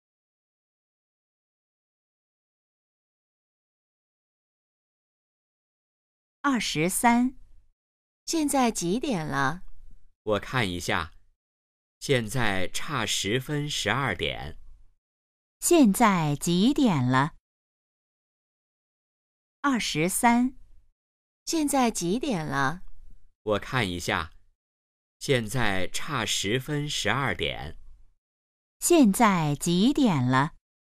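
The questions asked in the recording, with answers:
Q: 现在几点了?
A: 十一点五十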